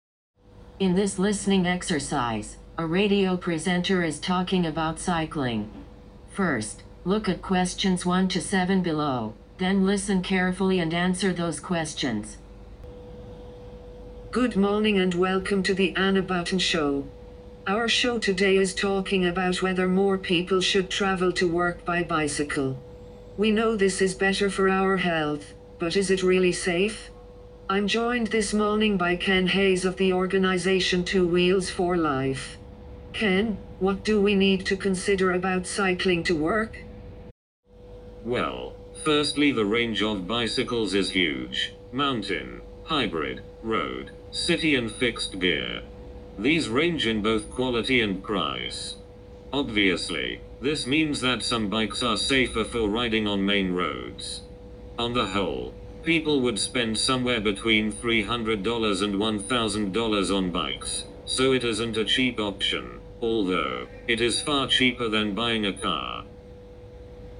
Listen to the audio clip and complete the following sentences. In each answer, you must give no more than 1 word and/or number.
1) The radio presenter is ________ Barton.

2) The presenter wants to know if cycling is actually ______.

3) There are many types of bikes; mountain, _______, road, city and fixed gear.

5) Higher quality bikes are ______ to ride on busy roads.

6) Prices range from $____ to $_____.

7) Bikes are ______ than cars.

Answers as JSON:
{"1": "Anna", "2": "safe", "3": "hybrid", "5": "safer", "6": "300 to $1000", "7": "cheaper"}

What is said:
In this listening exercise, a radio presenter is talking about cycling. First, look at questions 1 to 7 below then listen carefully and answer those questions.
Good morning and welcome to the Anna Barton Show. Our show today is talking about whether more people should travel to work by bicycle. We know this is better for our health, but is it really safe? I'm joined this morning by Ken Hayes of the organisation 2 Wheels 4 Life. Ken, what do we need to consider about cycling to work?
Well, firstly the range of bicycles is huge -mountain, hybrid, road, city and fixed gear. These range in both quality and price. Obviously, this means that some bikes are safer for riding on main roads. On the whole, people would spend somewhere between $300 and $1000 on bikes so it isn't a cheap option – although, it is far cheaper than buying a car!